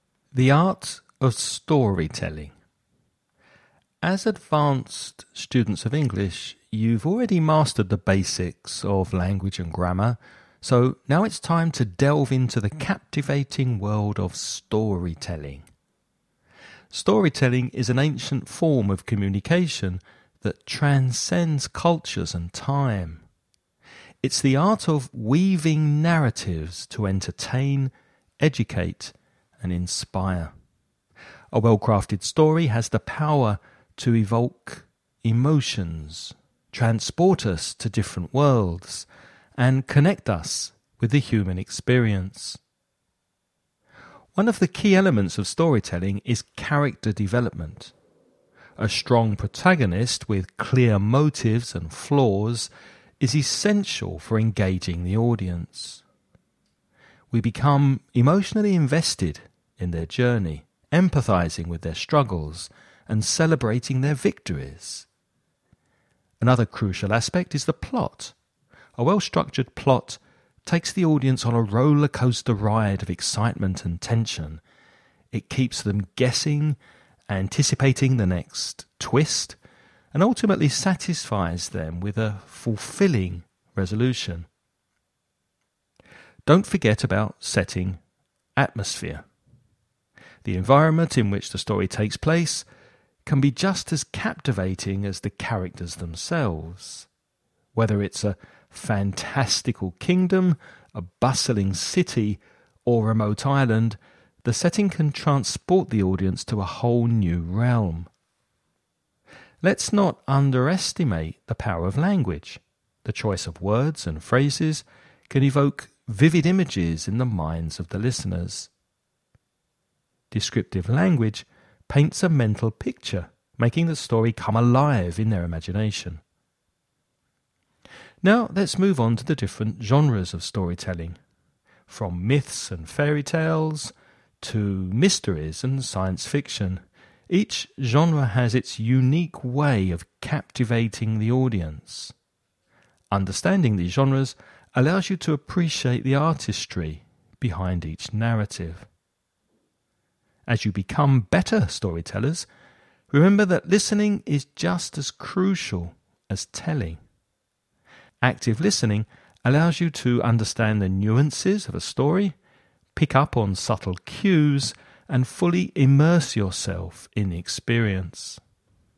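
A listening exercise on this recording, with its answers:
Now listen and answer the questions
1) What is one of the key elements of storytelling mentioned in the lecture?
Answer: Character development.

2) How does a well-structured plot impact the audience?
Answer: It takes them on a roller coaster ride of excitement and tension, keeps them guessing and satisfies them with a fulfilling resolution.

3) What does descriptive language do in storytelling?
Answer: It paints a mental picture, making the story come alive in the listeners' imagination.

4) What is one of the benefits of understanding different genres of storytelling?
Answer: It allows you to appreciate the artistry behind each narrative.

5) What do well-crafted stories have the power to do?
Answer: Evoke emotions, transport us to different worlds and connect us with the human experience.

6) What is the purpose of setting and atmosphere in storytelling?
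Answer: To transport the audience to a whole new realm.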